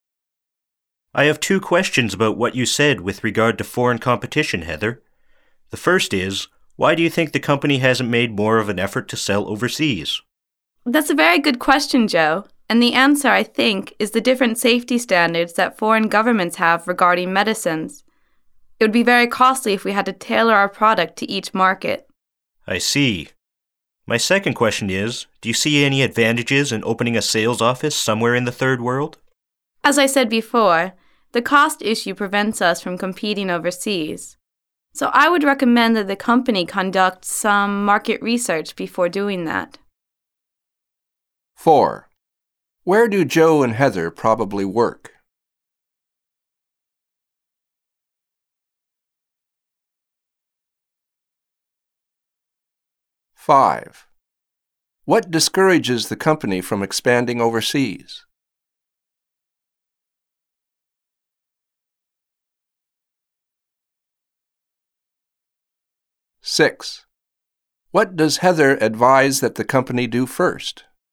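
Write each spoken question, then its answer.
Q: What discourages the company from expanding overseas?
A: The cost of meeting different foreign safety standards for medicines

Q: What does Heather advise that the company do first?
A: Conduct market research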